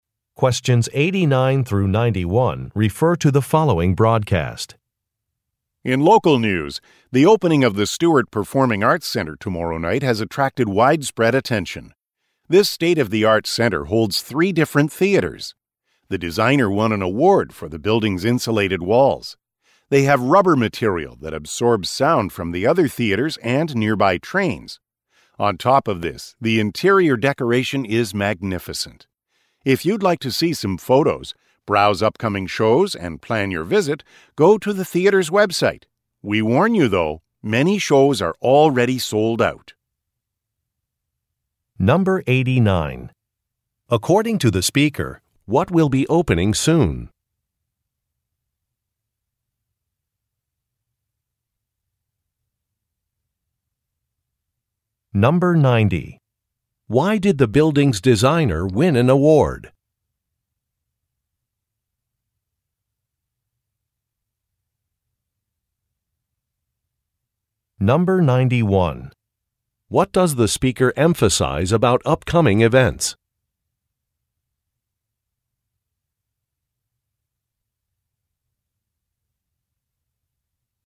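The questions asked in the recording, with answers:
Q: According to the speaker, what will be opening soon?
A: A performing arts center

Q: Why did the building's designer win an award?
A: For the building's insulated, sound-absorbing walls

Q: What does the speaker emphasize about upcoming events?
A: Many shows are already sold out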